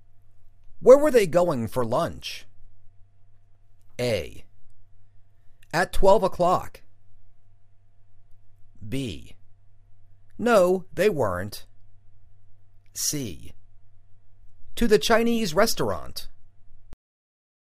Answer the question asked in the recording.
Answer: To the Chinese restaurant